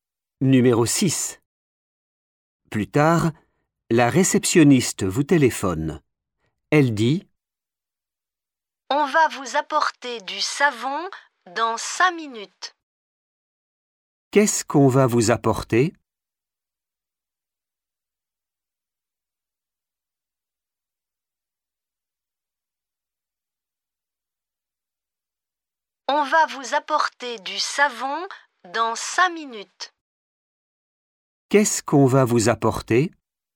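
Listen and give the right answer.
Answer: du savon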